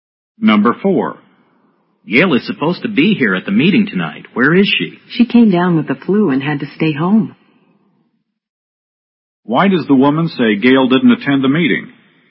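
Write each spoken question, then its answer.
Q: Why does the woman say Gail didn't attend the meeting?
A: She had the flu and stayed home.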